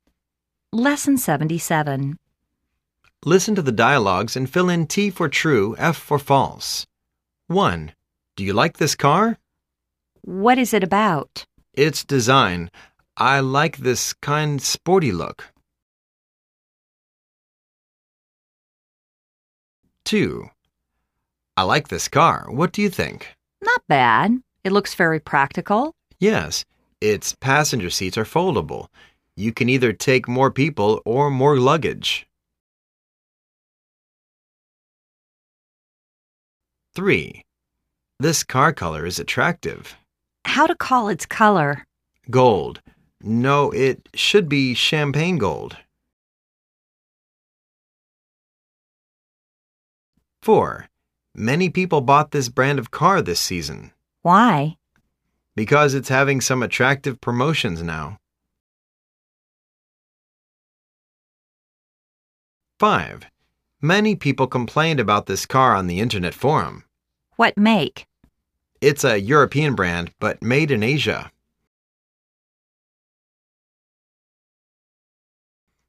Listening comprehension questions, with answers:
Listen to the dialogues and fill in T for "True", F for "False".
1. They are talking about the car function.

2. They have mentioned the car engine capacity.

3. They are discussing the car color.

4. They are talking about the reason why the car is popular.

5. They are talking about the brand of the car.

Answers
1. False
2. False
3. True
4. True
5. True